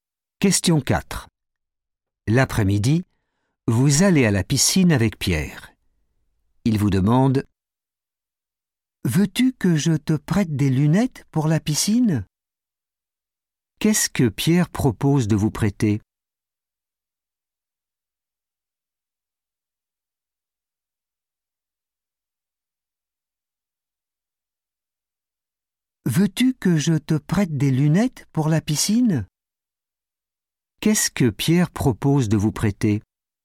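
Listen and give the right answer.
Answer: des lunettes pour la piscine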